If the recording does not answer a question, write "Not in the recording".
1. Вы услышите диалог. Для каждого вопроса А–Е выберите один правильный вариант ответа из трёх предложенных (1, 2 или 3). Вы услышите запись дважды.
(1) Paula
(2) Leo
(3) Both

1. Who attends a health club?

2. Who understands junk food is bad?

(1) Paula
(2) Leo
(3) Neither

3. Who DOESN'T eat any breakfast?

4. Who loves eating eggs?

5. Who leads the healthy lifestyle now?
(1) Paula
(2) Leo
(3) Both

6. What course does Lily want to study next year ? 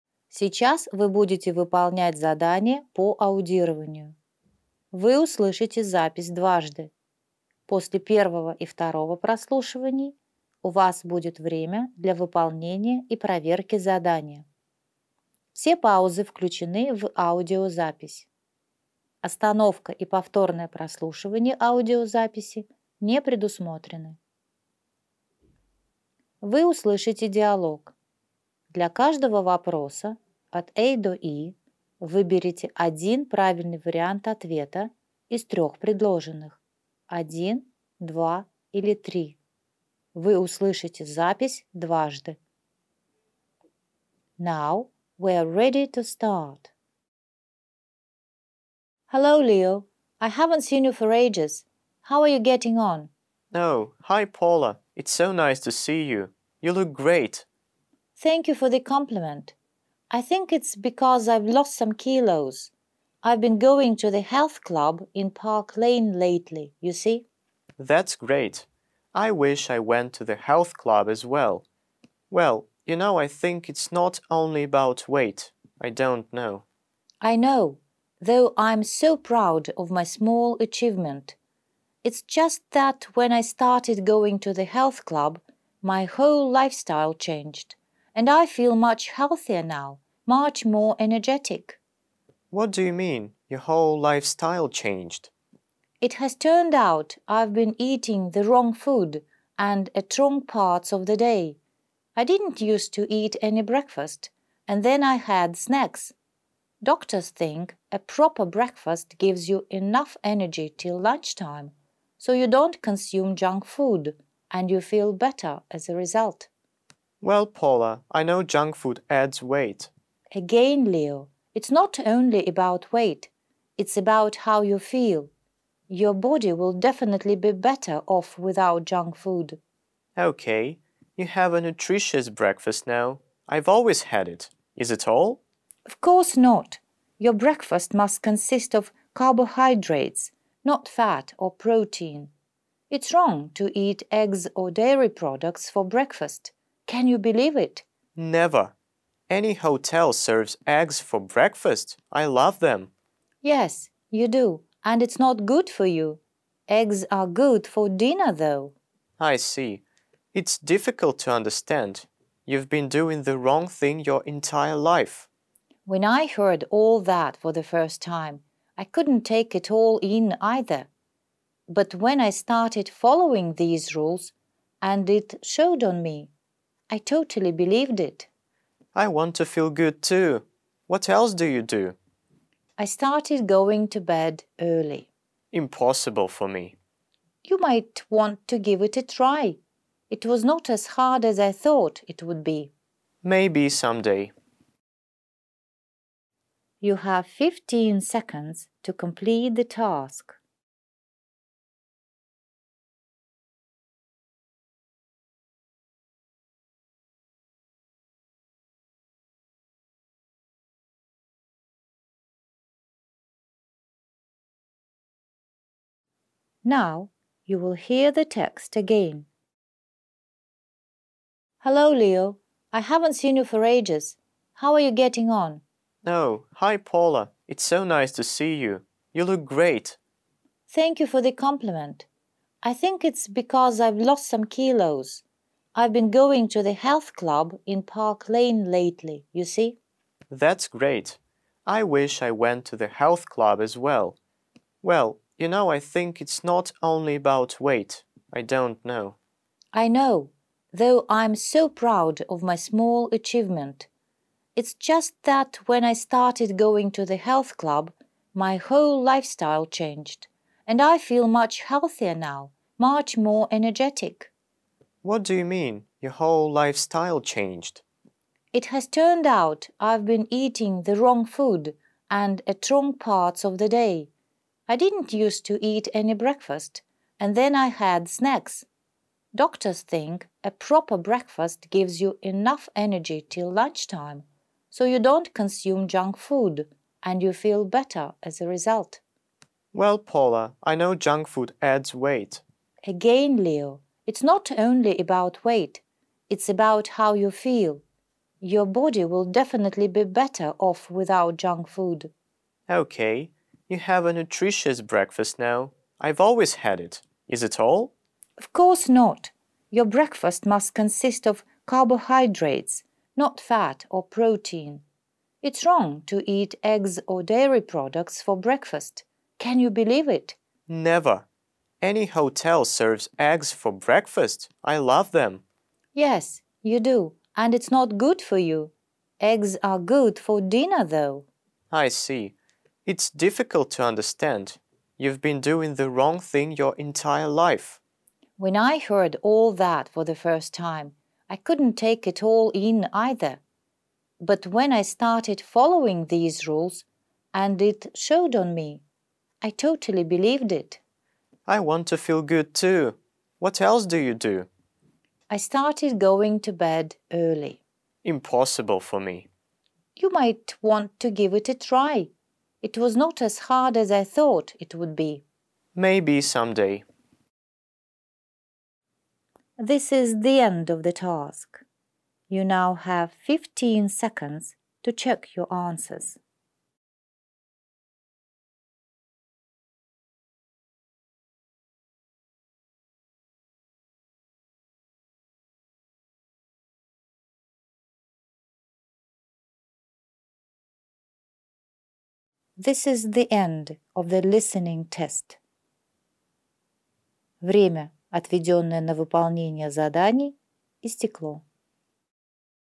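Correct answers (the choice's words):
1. Paula
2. Both
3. Neither
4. Leo
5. Paula
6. Not in the recording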